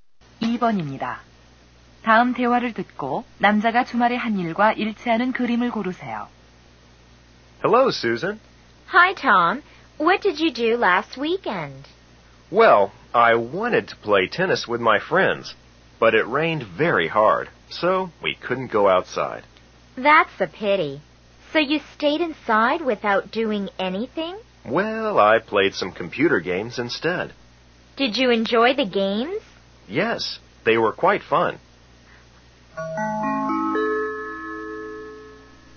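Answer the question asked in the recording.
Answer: 컴퓨터 게임을 했다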